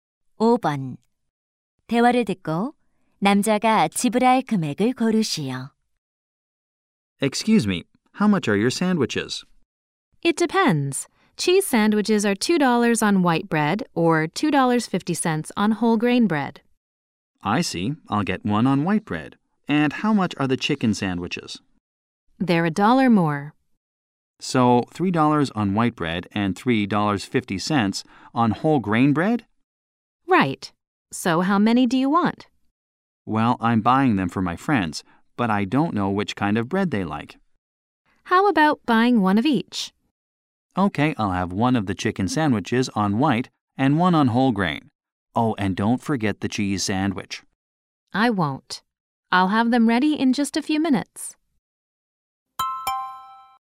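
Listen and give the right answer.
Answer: $8.50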